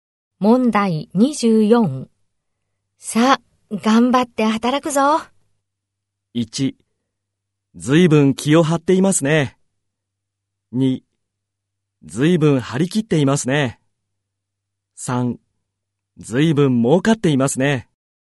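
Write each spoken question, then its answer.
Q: さあ、頑張って働くぞ。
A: 2: ずいぶん張り切っていますね。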